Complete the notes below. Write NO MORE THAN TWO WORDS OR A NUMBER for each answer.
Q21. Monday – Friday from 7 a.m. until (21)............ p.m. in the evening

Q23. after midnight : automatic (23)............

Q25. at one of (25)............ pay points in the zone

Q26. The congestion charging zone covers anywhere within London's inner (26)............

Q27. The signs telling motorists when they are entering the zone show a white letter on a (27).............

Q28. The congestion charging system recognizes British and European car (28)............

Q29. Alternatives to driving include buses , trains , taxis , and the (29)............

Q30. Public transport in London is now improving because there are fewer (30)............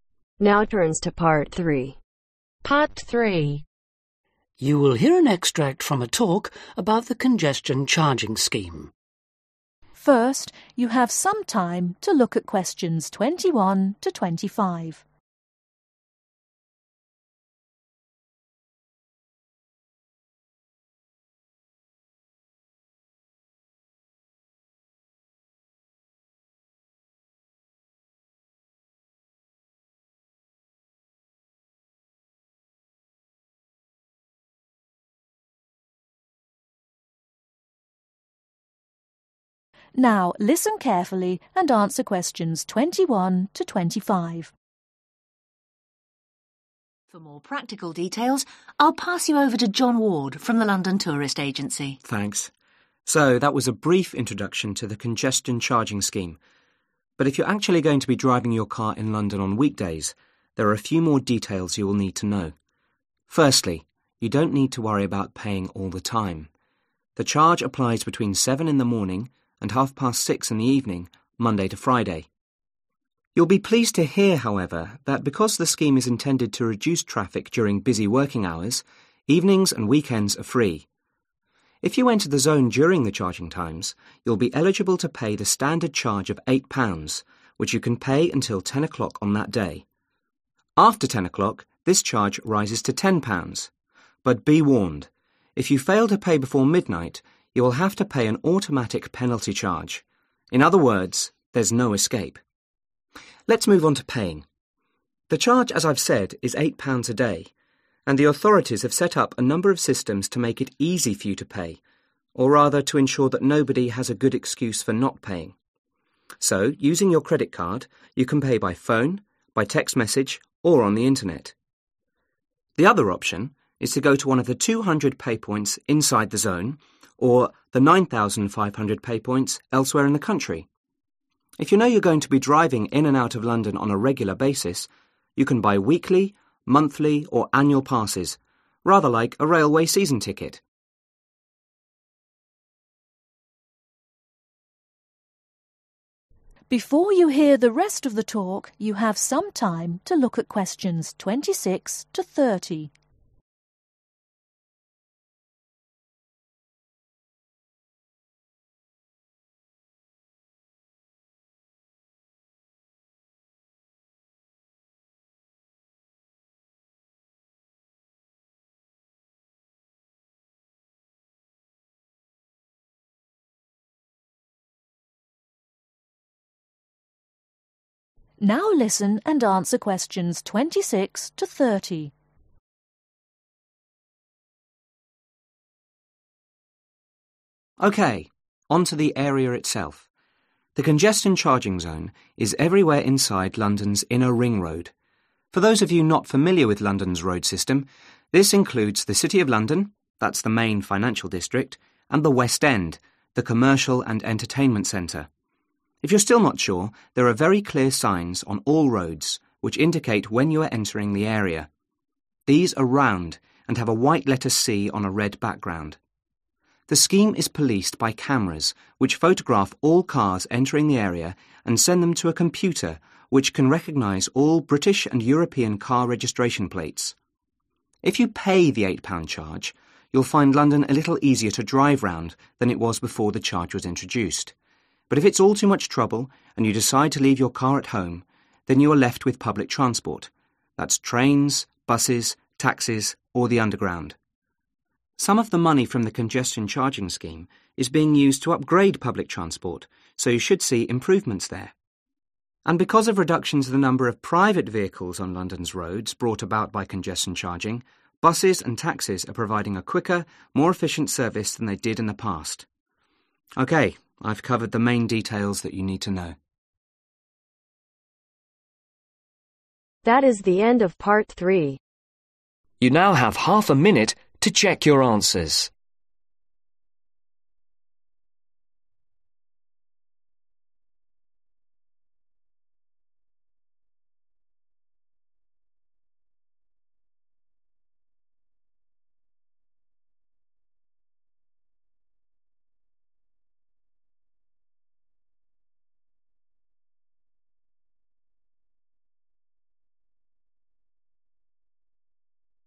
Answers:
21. 6.30
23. Penalty charge
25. 200
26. Ring road
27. Red background
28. Registration plates
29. Underground
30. Private vehicles